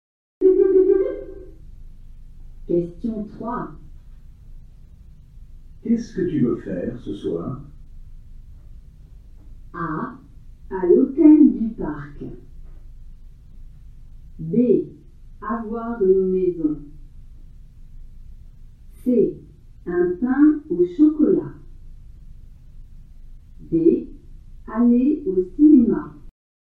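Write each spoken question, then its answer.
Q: Qu'est-ce que tu veux faire ce soir?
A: D: Aller au cinéma.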